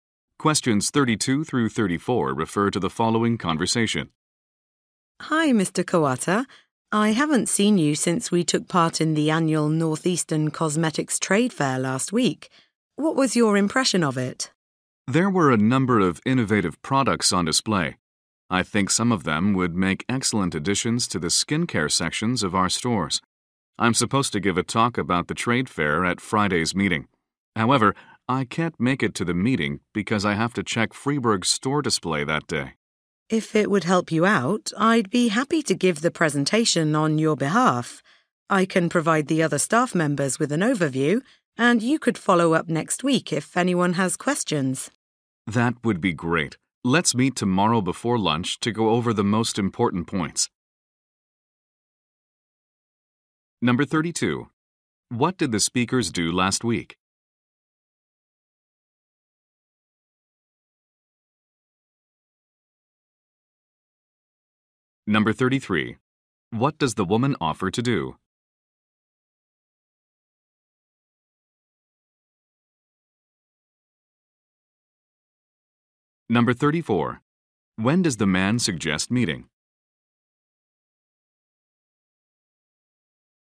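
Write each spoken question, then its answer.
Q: What did the speakers do last week?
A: They attended a cosmetics trade fair.

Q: What does the woman offer to do?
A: Give the presentation on his behalf.

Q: When does the man suggest meeting?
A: Tomorrow before lunch.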